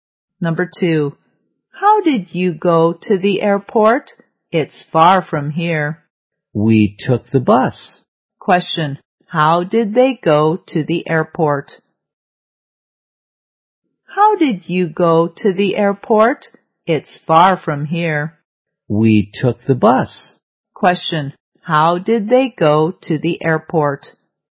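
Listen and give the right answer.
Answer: By bus.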